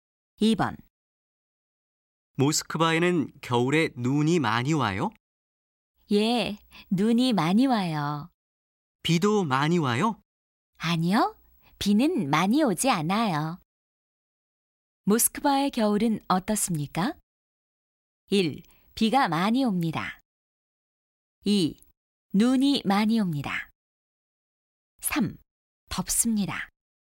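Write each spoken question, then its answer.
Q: 모스크바의 겨울은 어떻습니까?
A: 2: 눈이 많이 옵니다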